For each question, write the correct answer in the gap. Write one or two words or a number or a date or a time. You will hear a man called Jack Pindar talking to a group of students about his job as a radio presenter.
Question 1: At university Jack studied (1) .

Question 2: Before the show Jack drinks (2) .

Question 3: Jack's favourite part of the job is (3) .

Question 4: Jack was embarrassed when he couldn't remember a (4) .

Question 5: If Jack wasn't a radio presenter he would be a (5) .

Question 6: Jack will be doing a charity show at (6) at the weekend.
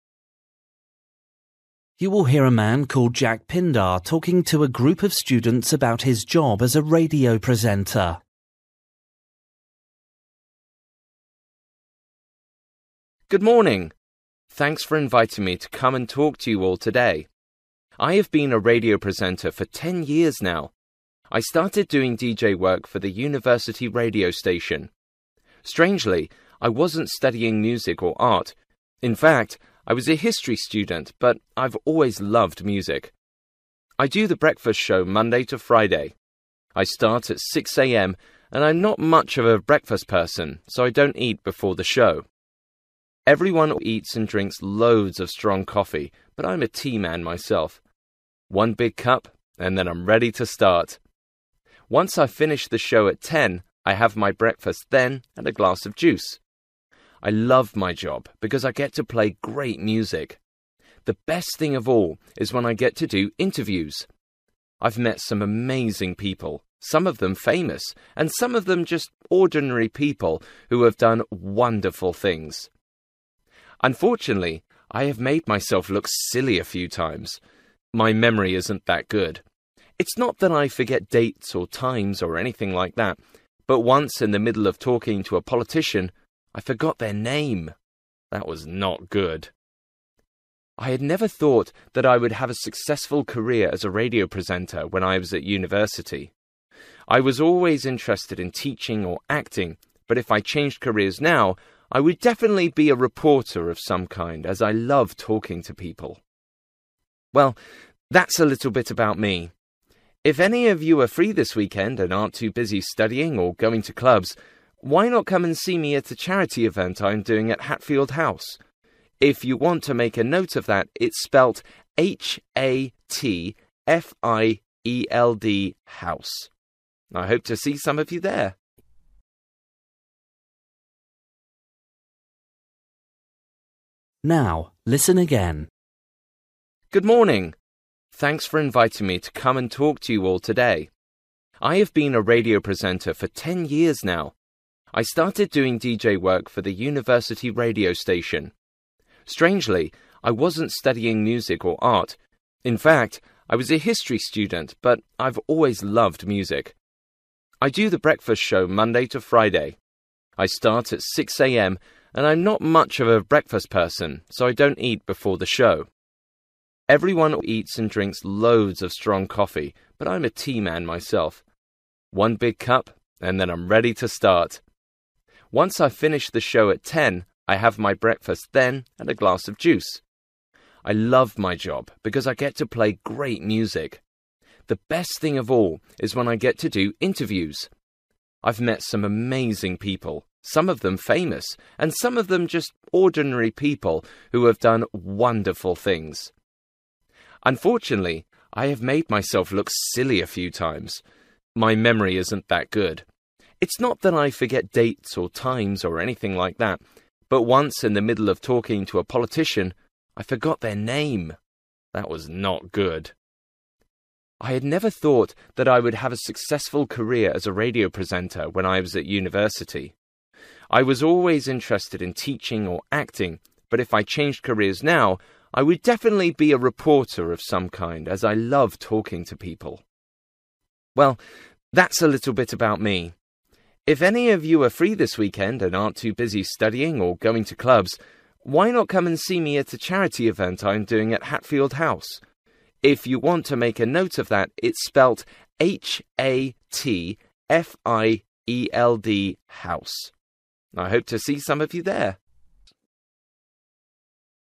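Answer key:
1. history
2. tea
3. interviews
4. name
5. reporter
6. Hatfield House

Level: Luyện nghe trình độ B1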